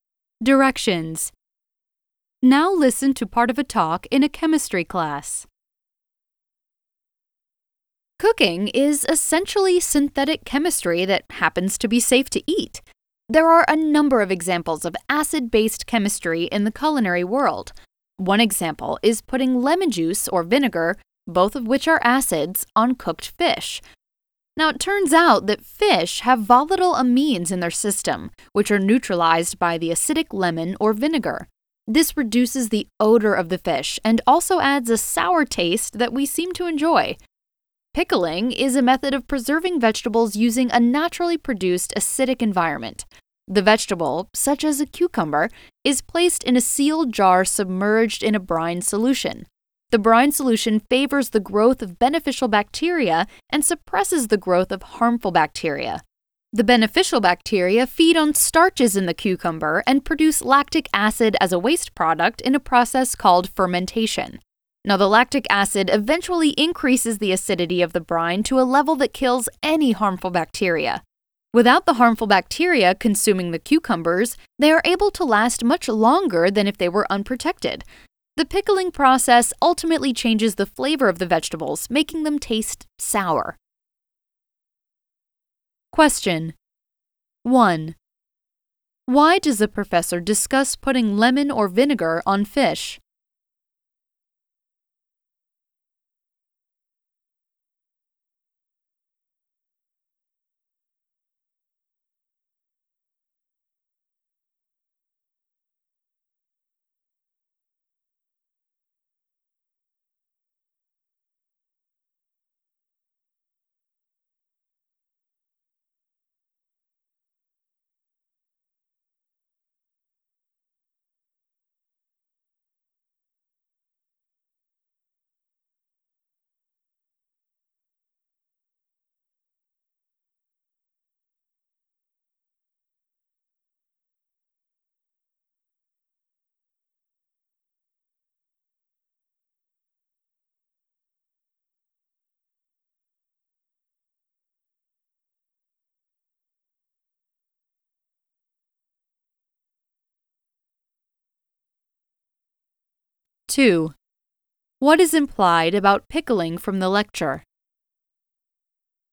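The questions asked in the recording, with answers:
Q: Why does the professor discuss putting lemon or vinegar on fish?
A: To give an example of acid-base chemistry in cooking: the acid neutralizes the fish's amines, which reduces the smell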